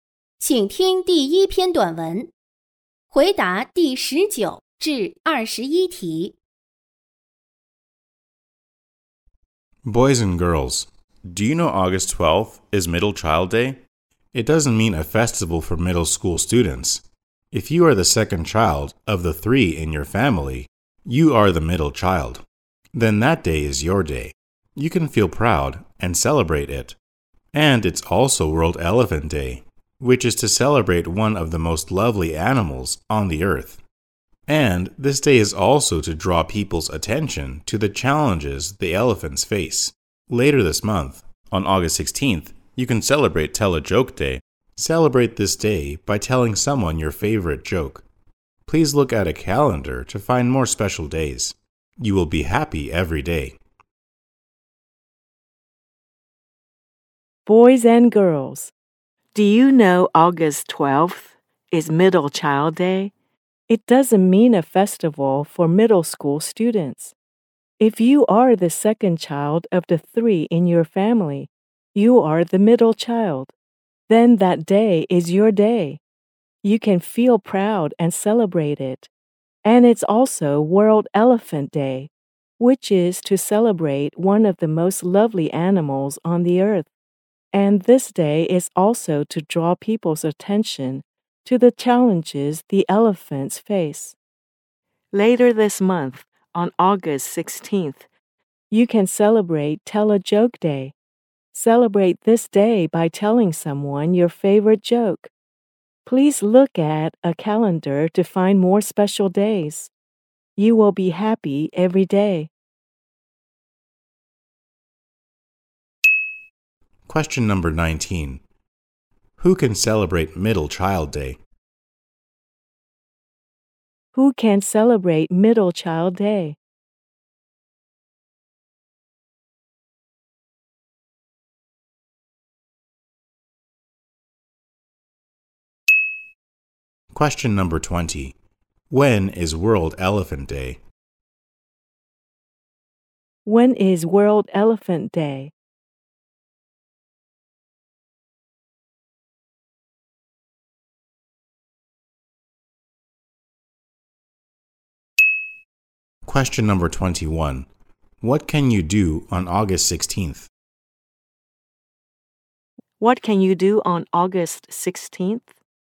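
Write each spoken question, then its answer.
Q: Who can celebrate Middle Child Day?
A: The second child of three children in a family

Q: When is World Elephant Day?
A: August 12th

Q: What can you do on August 16th?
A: Tell someone your favorite joke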